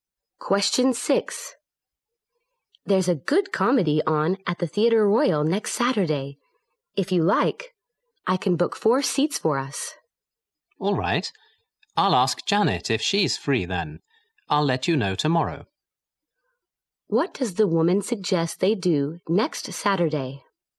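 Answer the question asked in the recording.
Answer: See a comedy at the Theatre Royal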